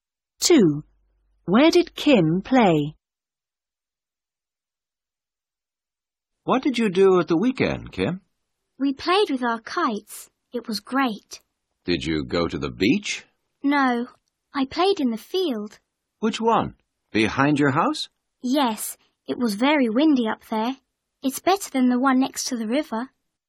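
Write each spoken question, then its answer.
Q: Where did Kim play?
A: In the field behind her house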